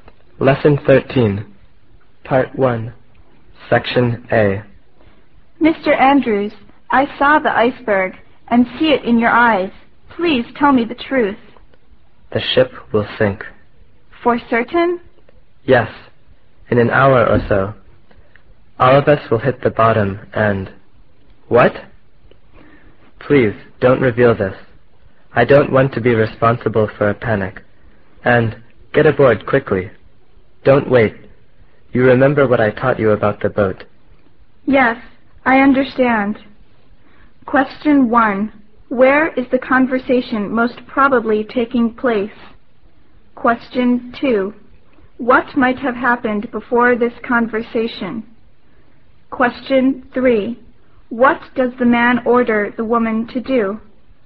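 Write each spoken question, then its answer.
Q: Where is the conversation most probably taking place?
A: On a ship

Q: What might have happened before this conversation?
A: The ship hit an iceberg

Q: What does the man order the woman to do?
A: Get aboard a boat quickly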